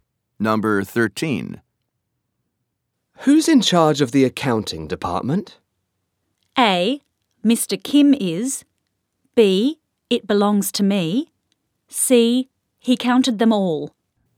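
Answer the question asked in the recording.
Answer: A: Mr. Kim is.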